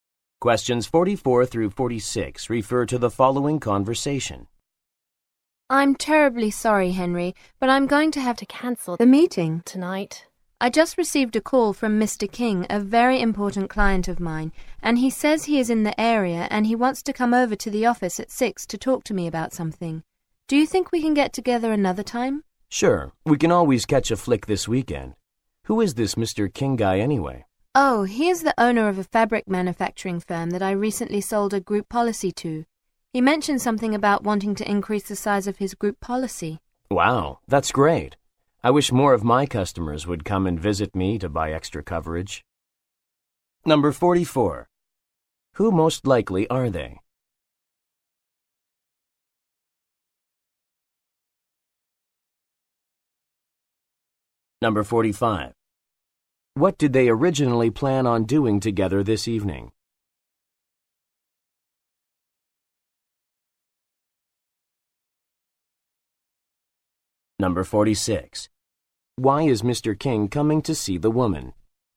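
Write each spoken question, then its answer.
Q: Why is Mr. King coming to see the woman?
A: To increase the size of his group policy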